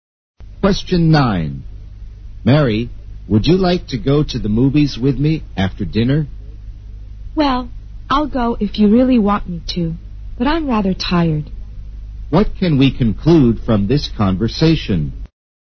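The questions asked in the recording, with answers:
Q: What can we conclude from this conversation?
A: Mary is tired and doesn't really want to go to the movies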